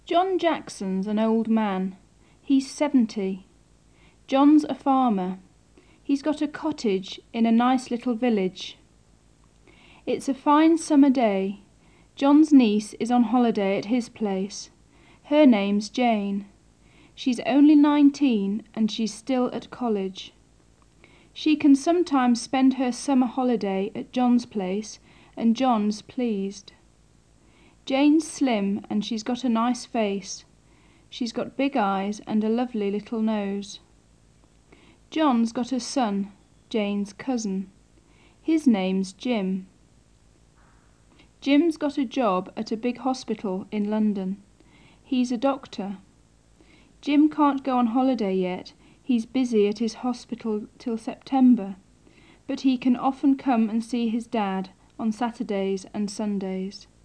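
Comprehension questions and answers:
3. Ответьте на следующие вопросы.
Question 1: Has John got a job in a big city?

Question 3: John's a businessman, isn't he?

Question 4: His niece Jane's only fifteen, isn't she?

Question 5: Is she at college yet?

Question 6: She isn't on holiday yet, is she?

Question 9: Has John got a son? He's Jane's cousin, isn't he?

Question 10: His name's Tom, isn't it?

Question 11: Is he a teacher?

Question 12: Has he got a job at an office?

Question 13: Can he go on holiday yet?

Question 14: Can he come and see his Dad often?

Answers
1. No, he's a farmer in a little village.
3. No, he's a farmer.
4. No, she's nineteen.
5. Yes, she's still at college.
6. Yes, she is, at John's place.
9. Yes, he has; yes, he is.
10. No, his name's Jim.
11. No, he's a doctor.
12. No, at a big hospital in London.
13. No, he can't; he's busy till September.
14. Yes, on Saturdays and Sundays.

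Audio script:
John Jackson's an old man. John's a farmer. He's got a cottage In a nice little village.
It's a fine summer day. John's niece on holiday at his place. Her name's Jane. She's only nineteen and she's still at college. She can sometimes spend her summer holiday at John's place, and John's pleased. Jane's slim and she's got a nice face: she's got big eyes and a lovely little nose.
John's got a son, Jane's cousin. His name's Jim. Jim's got a job at big hospital in London. He's a doctor.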